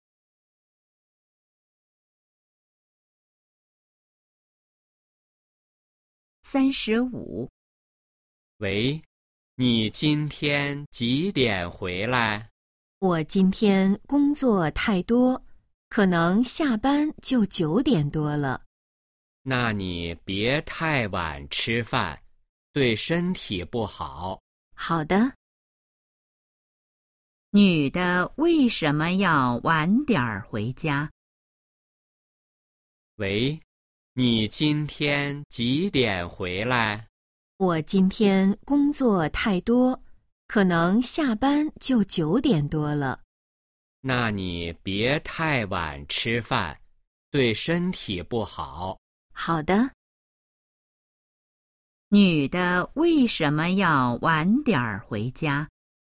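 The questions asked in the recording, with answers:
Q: 女的为什么要晚点回家?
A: 今天工作太多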